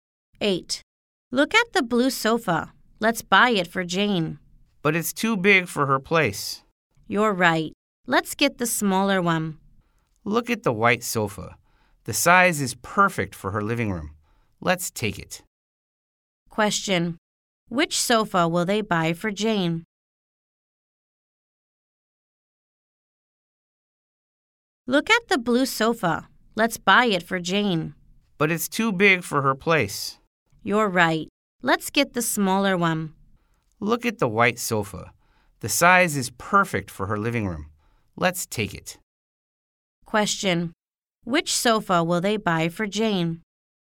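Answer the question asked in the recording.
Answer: The white sofa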